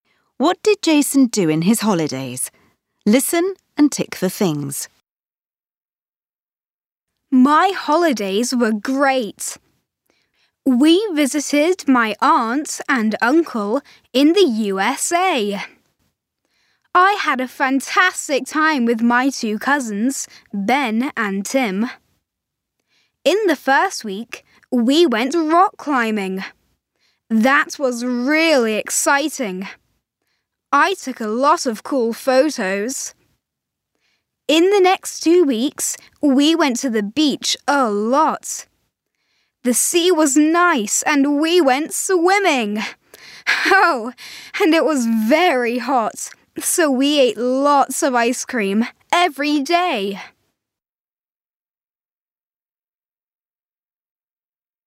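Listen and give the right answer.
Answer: He visited his aunt and uncle in the USA, went rock climbing, took photos, went to the beach, went swimming and ate ice cream.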